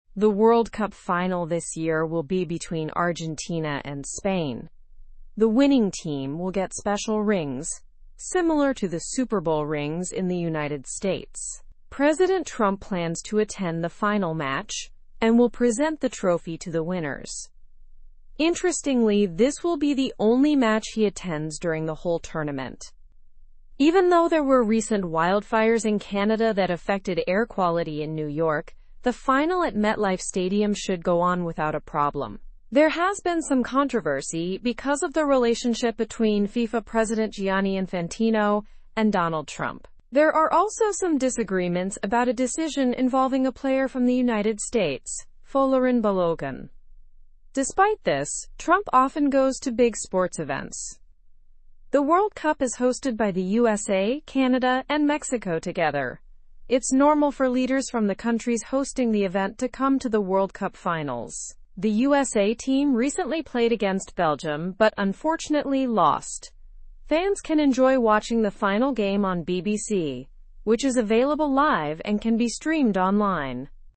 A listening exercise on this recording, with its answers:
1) Who are the finalists in this year's World Cup?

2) What do the winners of the World Cup receive as a prize?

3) Which US president is attending the World Cup final?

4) Has President Trump attended any other matches during the tournament?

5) What event in Canada affected the air quality in New York?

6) Where can fans watch the World Cup final?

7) Which countries co-hosted the World Cup?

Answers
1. Argentina and Spain.
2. They receive special rings.
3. President Donald Trump.
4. No, he has not attended any other matches.
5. Recent wildfires.
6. On BBC, both live and online.
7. The USA, Canada, and Mexico.

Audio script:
The World Cup final this year will be between Argentina and Spain. The winning team will get special rings, similar to the Super Bowl rings in the United States. President Trump plans to attend the final match and will present the trophy to the winners. Interestingly, this will be the only match he attends during the whole tournament.
Even though there were recent wildfires in Canada that affected air quality in New York, the final at MetLife Stadium should go on without a problem. There has been some controversy because of the relationship between FIFA President Gianni Infantino and Donald Trump. There are also some disagreements about a decision involving a player from the United States, Folarin Balogun. Despite this, Trump often goes to big sports events.
The World Cup is hosted by the USA, Canada, and Mexico together. It's normal for leaders from the countries hosting the event to come to the World Cup finals. The USA team recently played against Belgium but unfortunately lost. Fans can enjoy watching the final game on BBC, which is available live and can be streamed online.

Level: (Level 2)